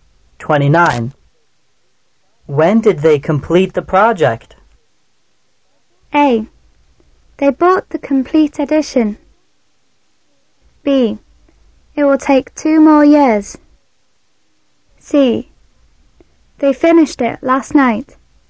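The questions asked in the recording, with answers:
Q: When did they complete the project?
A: C: They finished it last night.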